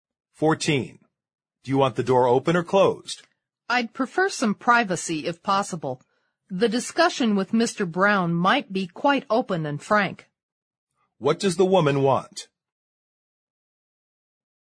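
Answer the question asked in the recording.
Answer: She wants the door closed.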